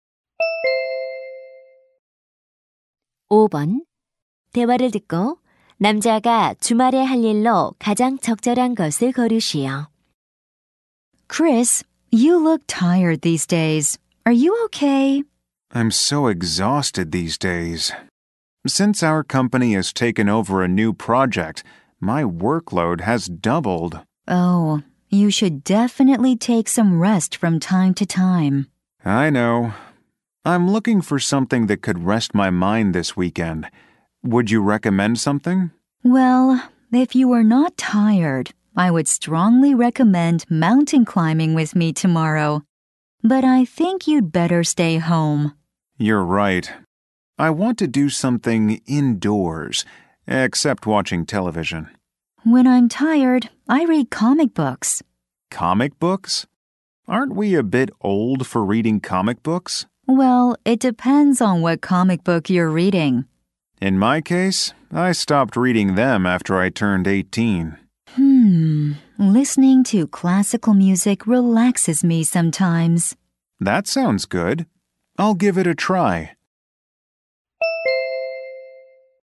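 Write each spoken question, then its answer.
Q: 남자가 주말에 할 일로 가장 적절한 것을 고르시오.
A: 클래식 음악 듣기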